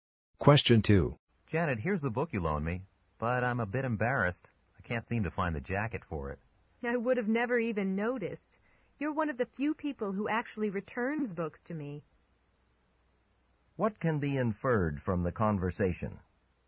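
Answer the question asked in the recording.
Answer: Janet doesn't mind about the missing jacket; most people don't return her books.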